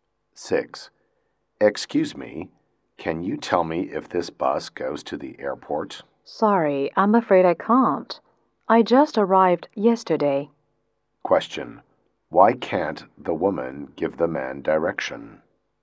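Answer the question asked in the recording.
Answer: She is new here; she just arrived yesterday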